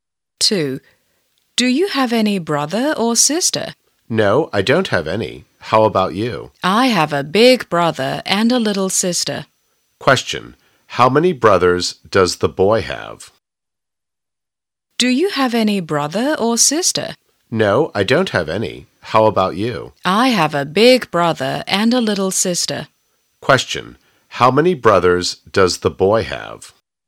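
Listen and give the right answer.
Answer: One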